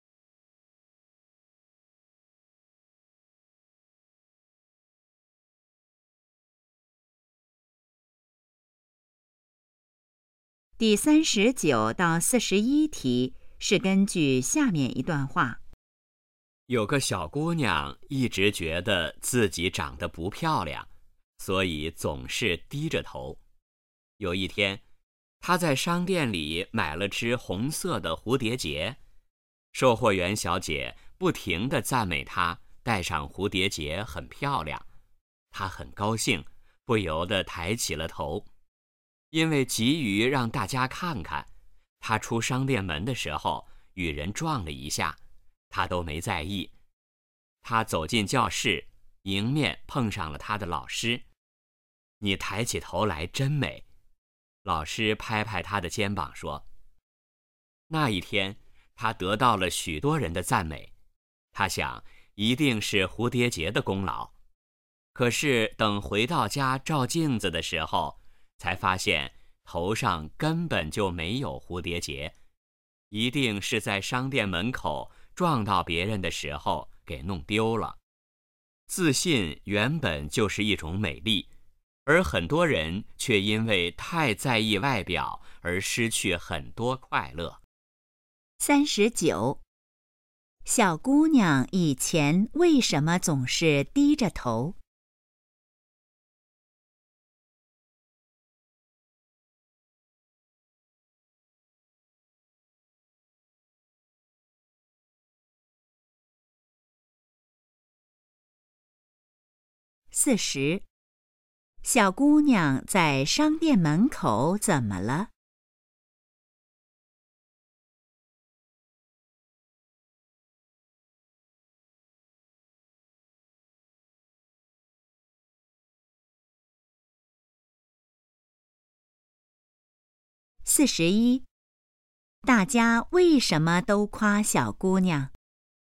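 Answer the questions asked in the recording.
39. 觉得自己长得不漂亮
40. 与人撞了一下,蝴蝶结弄丢了
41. 她抬起头来很自信、很美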